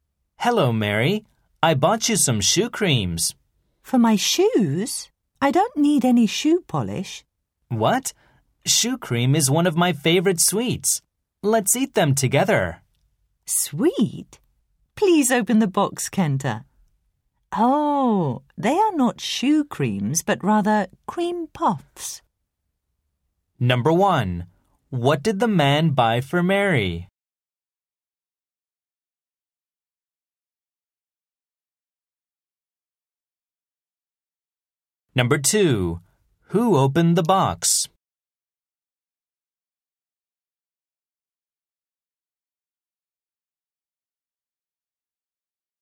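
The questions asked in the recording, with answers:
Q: What did the man buy for Mary?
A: Cream puffs (he called them shoe creams)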